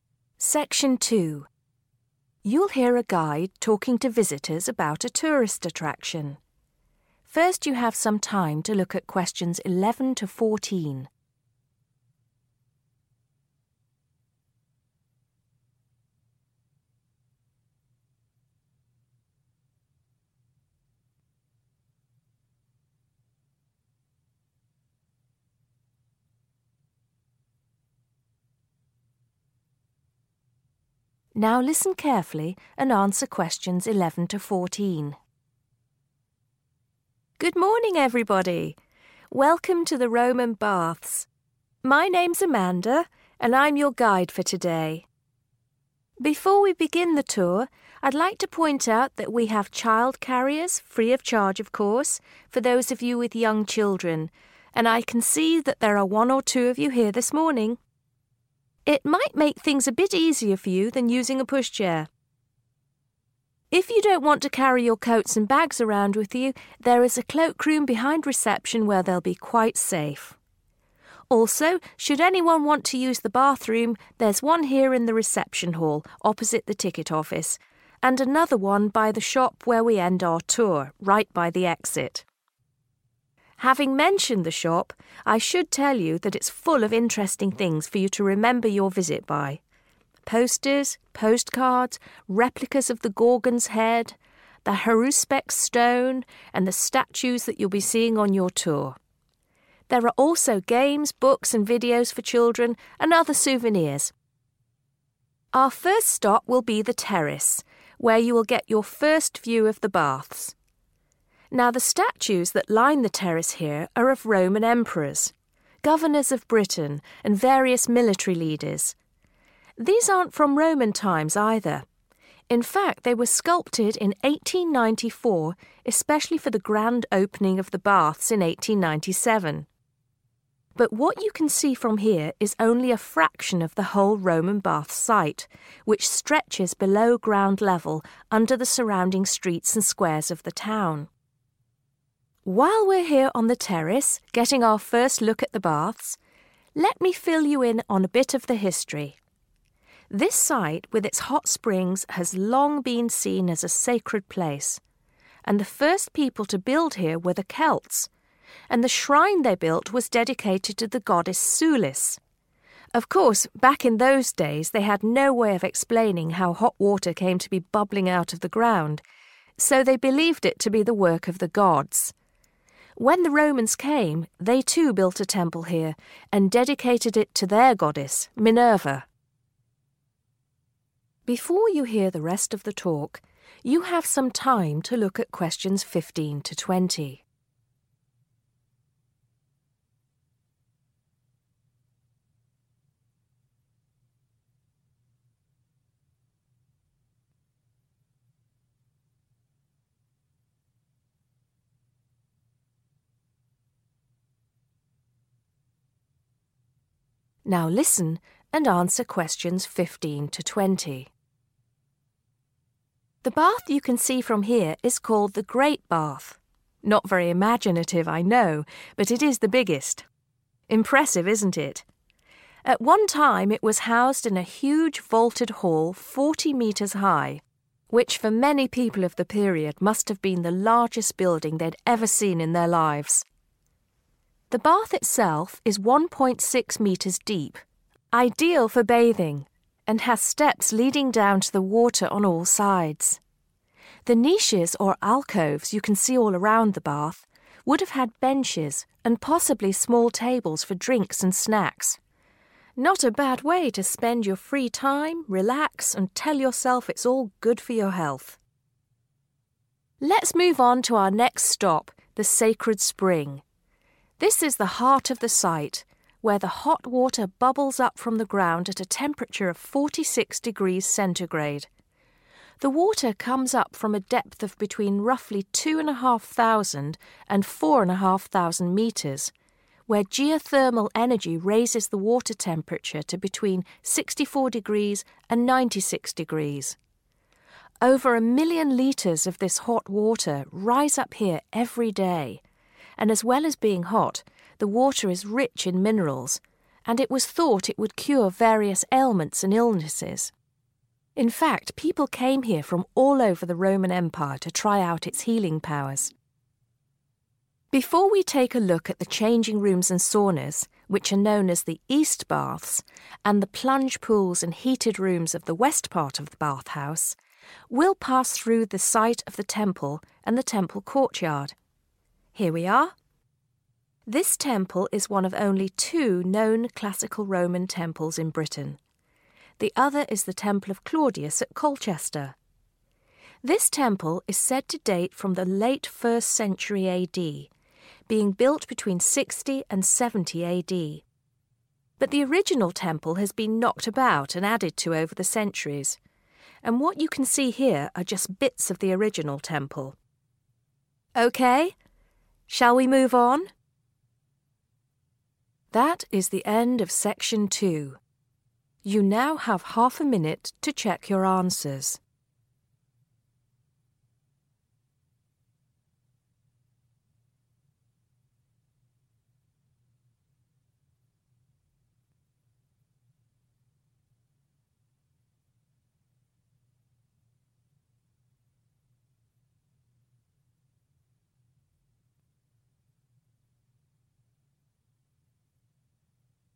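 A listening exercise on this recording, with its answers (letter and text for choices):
Choose the correct letter. A, B or C.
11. What can visitors use free of charge?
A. pushchairs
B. child carriers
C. coats and bags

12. Which of the following can visitors buy at the shop?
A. coins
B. refreshments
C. postcards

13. When did the Grand Opening of the baths occur?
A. 1894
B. 1897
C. 1994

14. The Romans built on the site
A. after the Celts.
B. before the Celts.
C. at the same time as the Celts.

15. The Great Bath is 15............... deep.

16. Around the bath area are alcoves where there were 16............... and tables where bathers could relax.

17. The water temperature of the Sacred Spring is 17........... .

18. The water is rich in 18............... .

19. In Roman times, the Sacred Spring was well-known for its 19.............. .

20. The Temple was constructed between 20................ 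AD.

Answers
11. B. child carriers
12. C. postcards
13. B. 1897
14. A. after the Celts.
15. 1.6 metres
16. benches
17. 46 degrees centigrade
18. minerals
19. healing powers
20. 60 and 70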